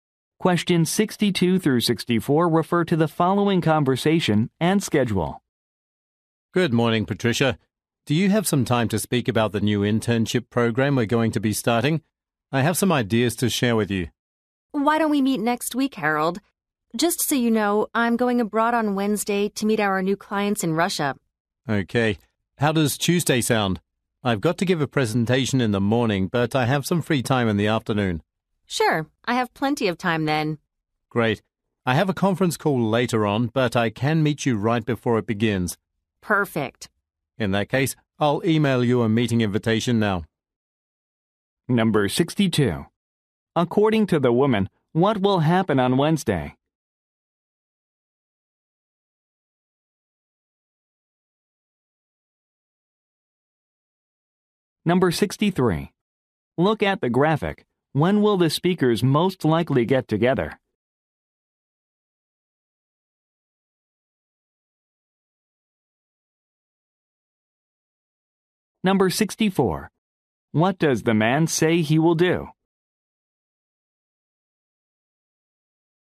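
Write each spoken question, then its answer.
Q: According to the woman, what will happen on Wednesday?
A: She will go abroad to meet new clients in Russia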